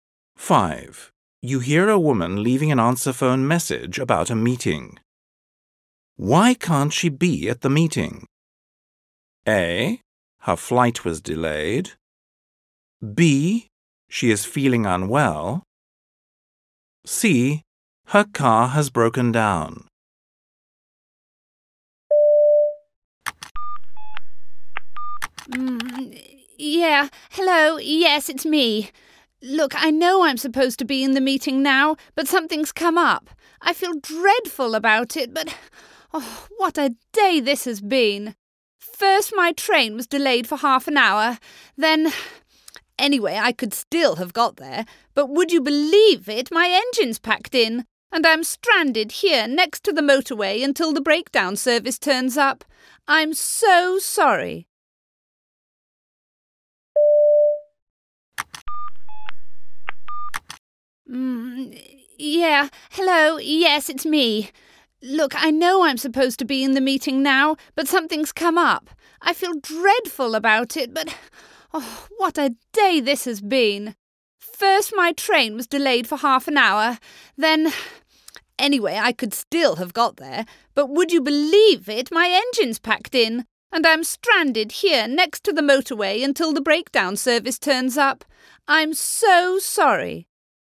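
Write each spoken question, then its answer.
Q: Why can't she be at the meeting?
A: C: Her car has broken down.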